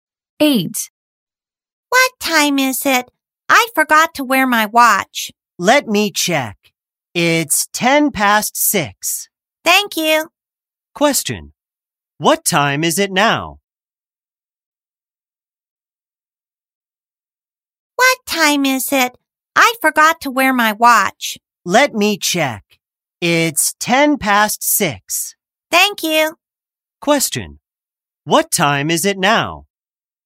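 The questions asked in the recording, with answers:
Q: Question. What time is it now?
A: 6:10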